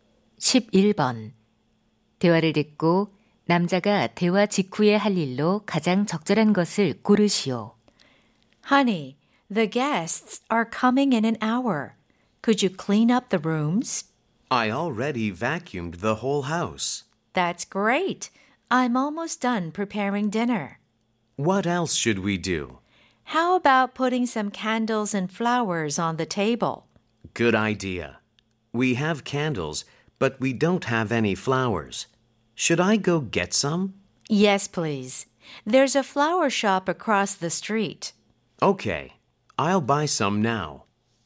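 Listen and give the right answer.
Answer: 꽃 사러 가기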